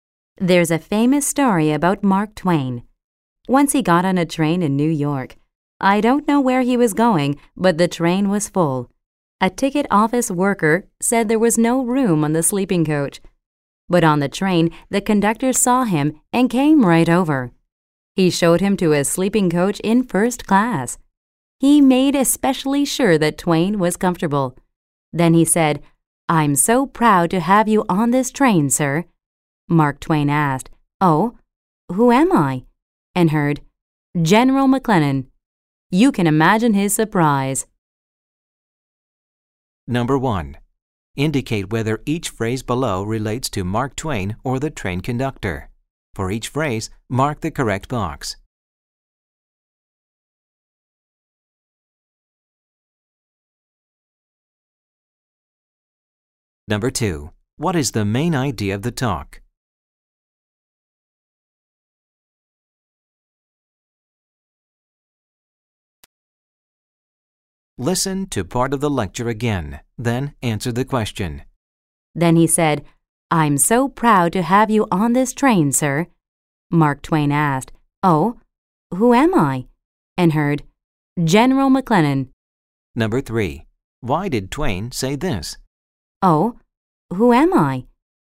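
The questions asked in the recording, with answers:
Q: What is the main idea of the talk?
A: A train conductor gave Mark Twain special treatment because he mistook him for someone else (General McLennan).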